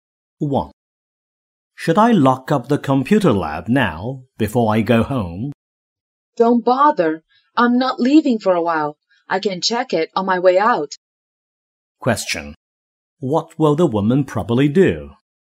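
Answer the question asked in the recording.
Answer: Lock up the computer lab on her way out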